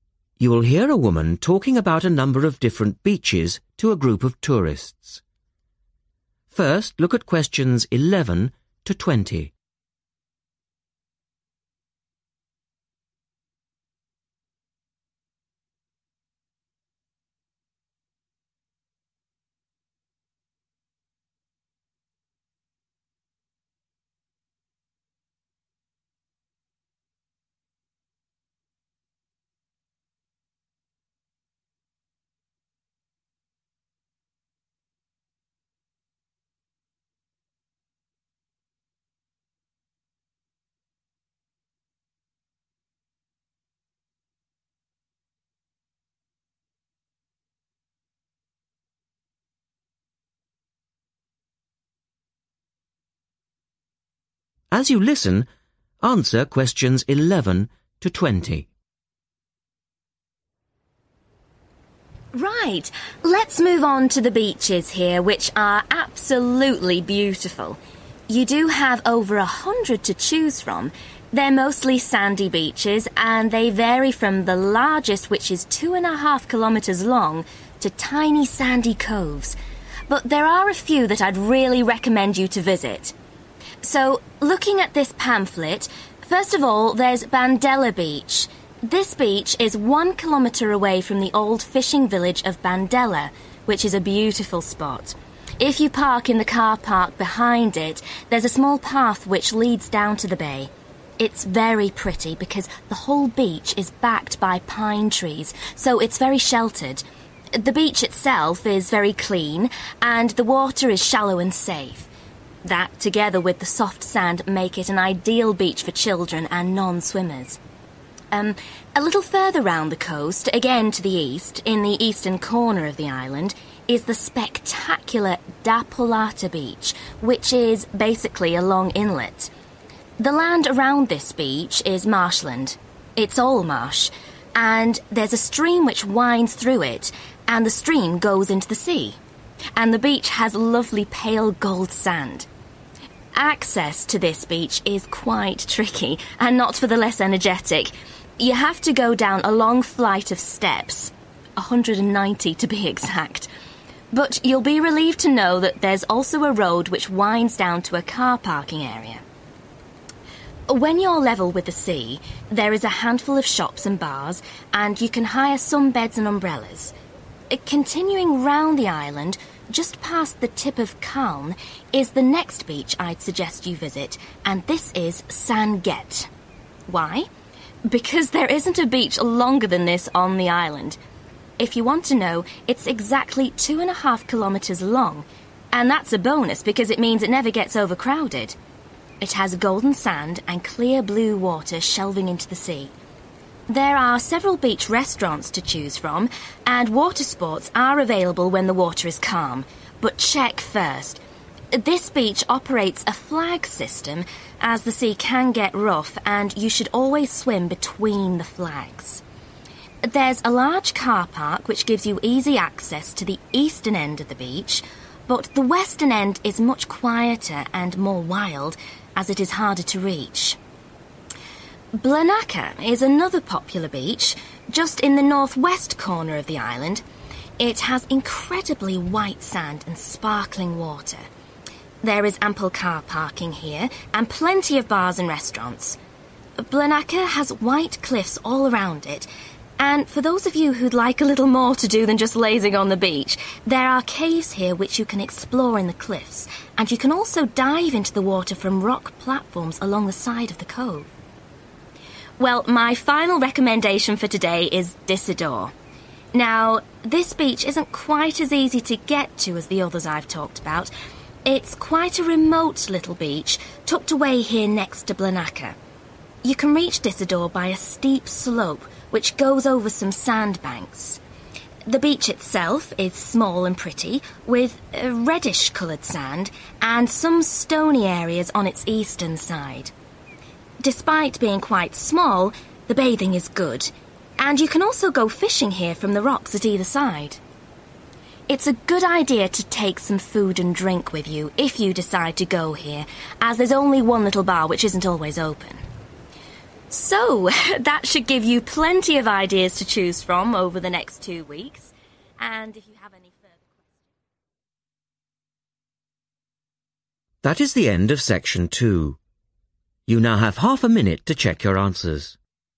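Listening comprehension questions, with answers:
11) 1 km from Bandela 11............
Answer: fishing village

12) surrounded by 12...............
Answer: pine trees

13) area around beach is 13..............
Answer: marshland

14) can hire 14...............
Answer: beds and umbrellas

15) 15................ beach on island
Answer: longest

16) check 16............. on beach in rough weather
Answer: flags

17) 17............. corner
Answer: northwest

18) surrounded by 18..............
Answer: white cliffs

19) need to walk over 19...............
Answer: sandbanks

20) need to take some 20.................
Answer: food and drink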